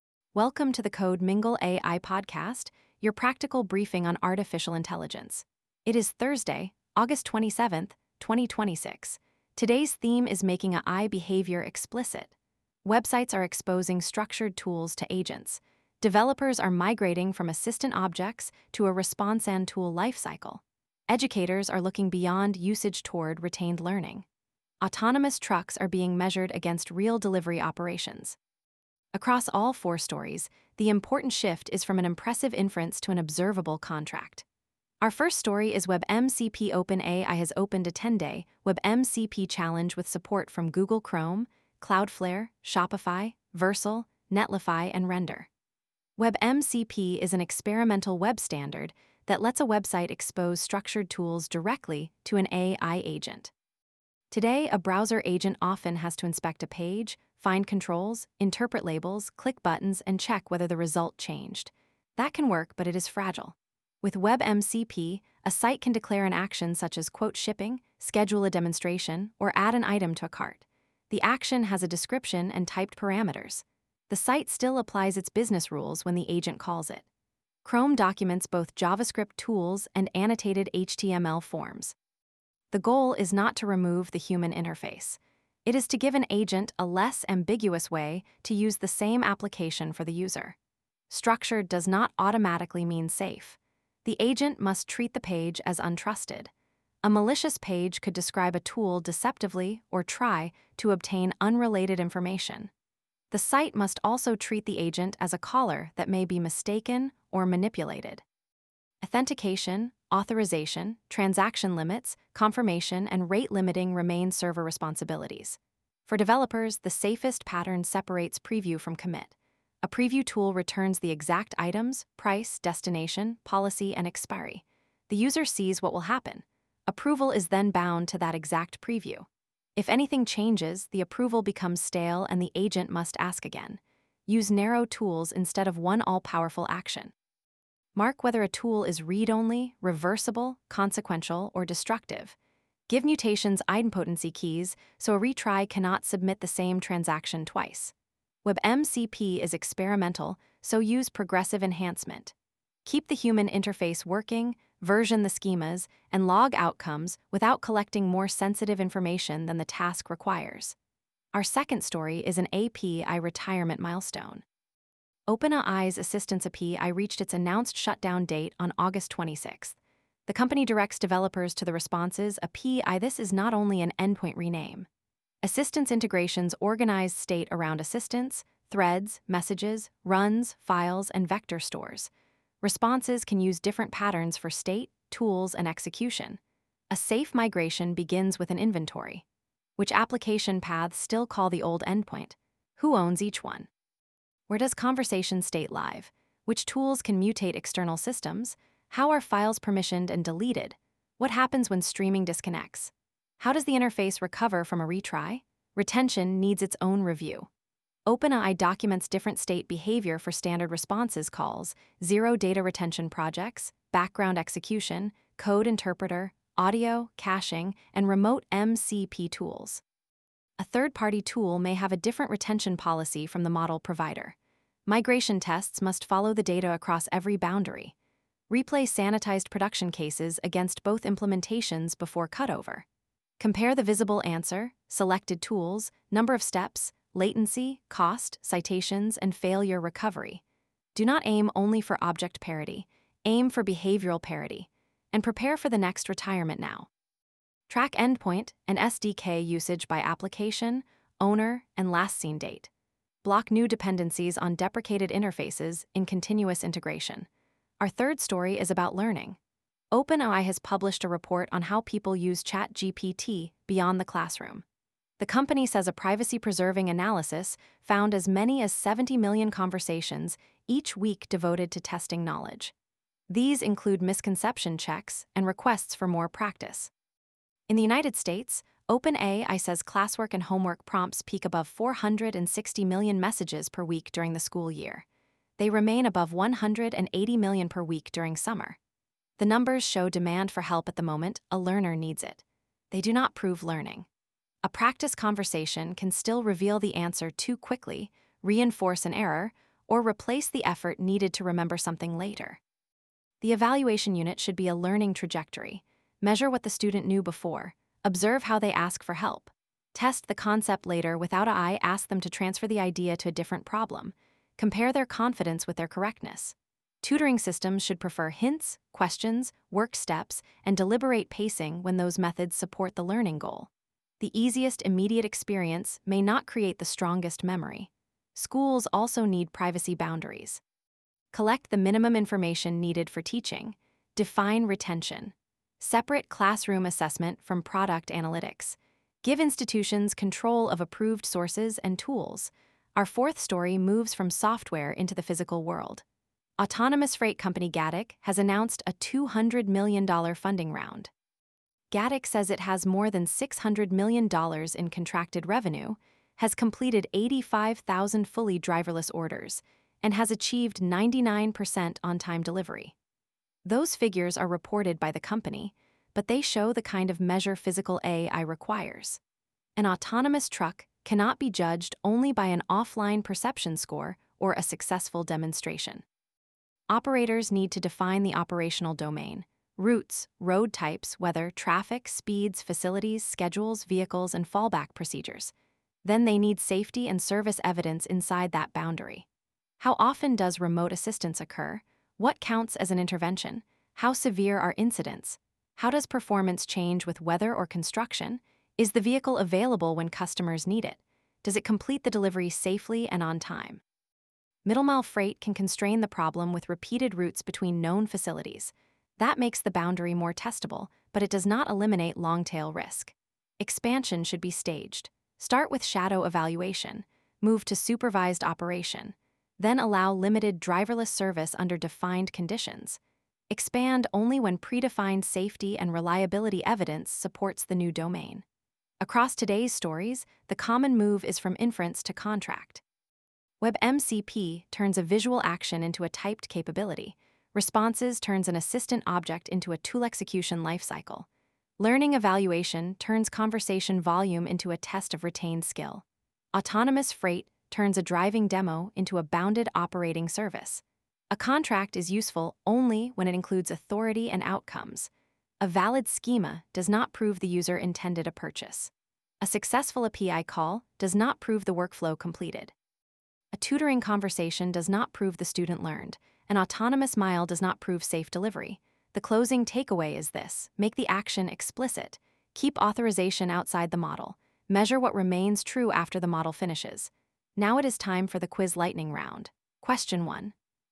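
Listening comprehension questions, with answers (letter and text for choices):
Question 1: What problem is WebMCP intended to reduce for browser agents?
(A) The need to infer every action from visual interface controls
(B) The need for websites to authenticate users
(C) The need for typed parameters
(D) The need for human-facing interfaces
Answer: (A) The need to infer every action from visual interface controls

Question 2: Which API did OpenAI direct Assistants API users toward?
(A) Images API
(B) Responses API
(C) Moderations API only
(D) An undocumented endpoint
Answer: (B) Responses API

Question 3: Why do weekly tutoring-conversation counts not prove learning?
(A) Conversation volume does not measure delayed retention or transfer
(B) Learning cannot be evaluated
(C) Only token counts matter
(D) Students never use AI for practice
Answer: (A) Conversation volume does not measure delayed retention or transfer

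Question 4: What interaction pattern is safest for a consequential browser-agent action?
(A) A broad tool that silently performs any action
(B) A preview followed by approval bound to the exact transaction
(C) A tool description that grants itself permission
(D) An irreversible call without an idempotency key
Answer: (B) A preview followed by approval bound to the exact transaction

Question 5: What makes an autonomous-freight evaluation operationally meaningful?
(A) A perception benchmark alone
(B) A count of promotional demonstrations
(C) Safety and delivery outcomes within a declared operational domain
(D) The largest possible route map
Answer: (C) Safety and delivery outcomes within a declared operational domain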